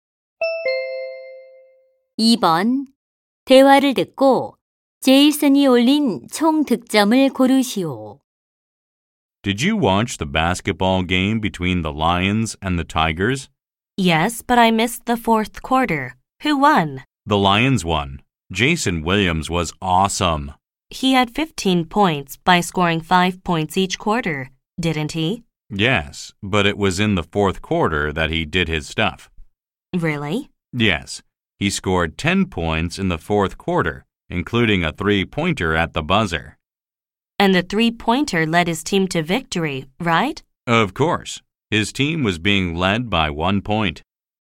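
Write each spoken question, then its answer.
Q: 대화를 듣고 제이슨이 올린 총 득점을 고르시오.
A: 25점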